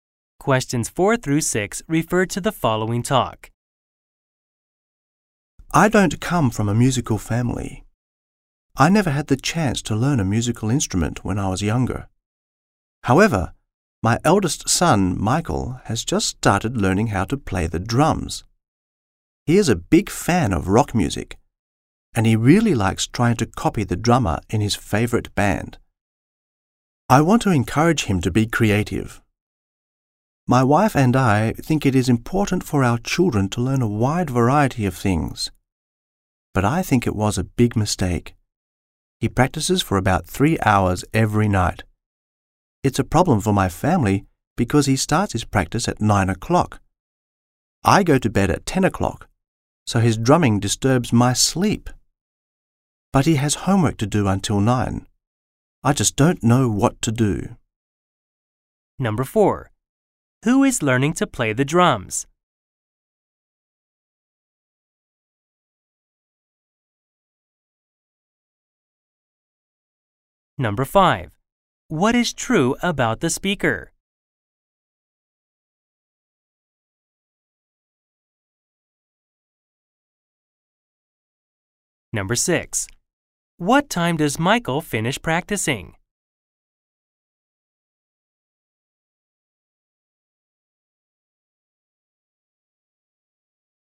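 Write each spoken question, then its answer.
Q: Who is learning to play the drums?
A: The speaker's eldest son, Michael

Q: What time does Michael finish practicing?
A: At about 12 o'clock (midnight)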